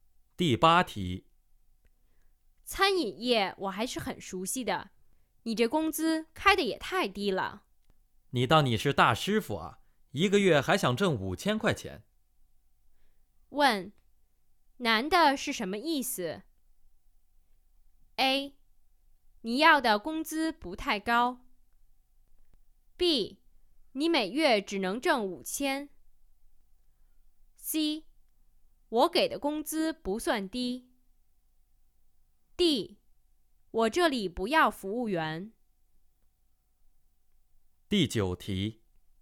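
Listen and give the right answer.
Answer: C: 我给的工资不算低。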